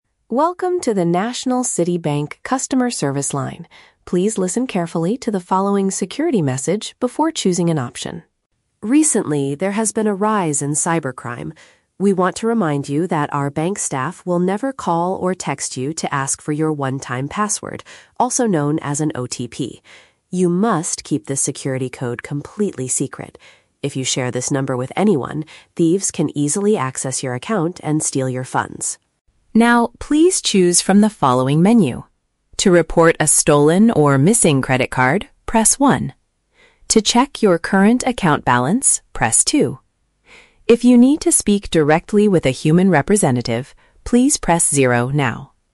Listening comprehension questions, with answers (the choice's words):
Listen to an automated message from a bank's telephone hotline. For each question, choose the correct answer (A, B, or C).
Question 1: What is the main purpose of the security warning at the beginning?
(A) To teach users how to safely change their online banking password.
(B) To advise people to hide a temporary security number from others.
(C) To inform customers that the bank recently lost some of their funds.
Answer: To advise people to hide a temporary security number from others.

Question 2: According to the message, what is a strict rule regarding the OTP?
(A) Official bank employees will never request this information from you.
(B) You must share it with the police if you are attacked by cybercriminals.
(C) It must be updated immediately every time you check your current balance.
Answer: Official bank employees will never request this information from you.

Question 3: How can a caller get in touch with an actual staff member?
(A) By pressing the number one to report a difficult problem.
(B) By pushing the zero button on their telephone keypad.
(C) By entering their personal account number after the voice prompt.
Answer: By pushing the zero button on their telephone keypad.

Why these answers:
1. The automated voice warns callers about the "One-Time Password" and says, "You must keep this security code completely secret" (hide a temporary security number). Option (A) is a trap; the message is about an OTP, not changing a permanent online password. Option (C) is a trap; the message warns that thieves might steal your funds, not that the bank has already lost them.
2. The recording states clearly, "our bank staff will never call or text you to ask for your One-Time Password" (official employees will never request it). Option (B) is not mentioned in the audio. Option (C) is a trap; checking your "account balance" is an option in the menu, but it doesn't require updating the OTP.
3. The system says, "If you need to speak directly with a human representative (an actual staff member), please press 0 now." Option (A) is a trap; pressing 1 is to report a "stolen or missing credit card," not to speak to a person generally. Option (C) is a trap; the system does not ask the user to enter an account number yet.

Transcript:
Automated Voice: Welcome to the National City Bank customer service line. Please listen carefully to the following security message before choosing an option.
Recently, there has been a rise in cybercrime. We want to remind you that our bank staff will never call or text you to ask for your One-Time Password, also known as an OTP. You must keep this security code completely secret. If you share this number with anyone, thieves can easily access your account and steal your funds.
Now, please choose from the following menu. To report a stolen or missing credit card, press 1. To check your current account balance, press 2. If you need to speak directly with a human representative, please press 0 now.